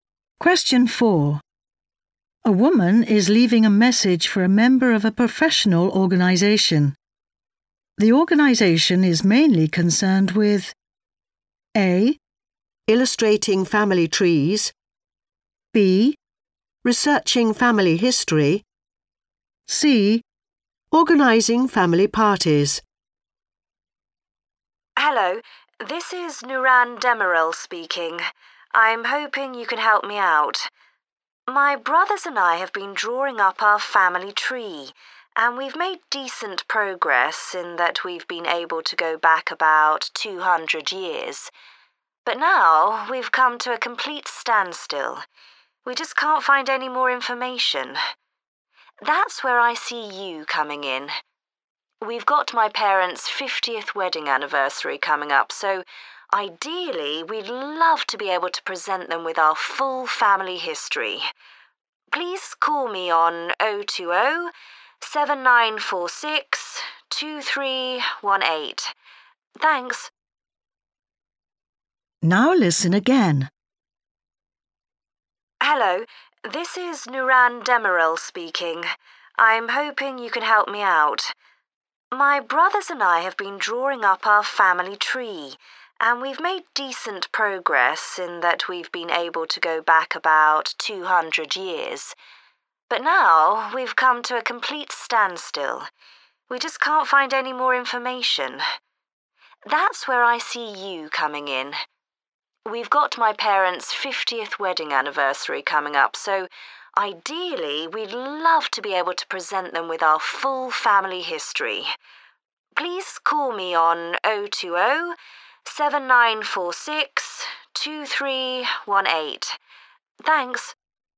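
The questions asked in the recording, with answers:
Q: The organisation is mainly concerned with A.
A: B: Researching family history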